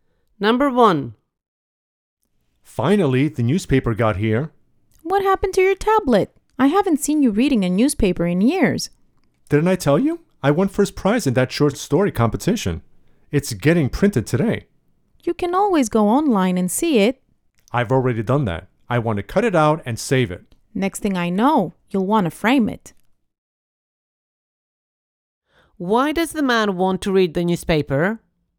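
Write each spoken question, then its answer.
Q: Why does the man want to read the newspaper?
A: His winning short story is printed in it and he wants to cut it out and keep it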